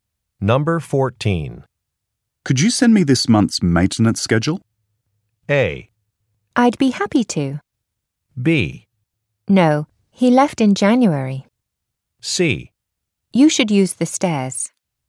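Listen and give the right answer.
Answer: A: I'd be happy to.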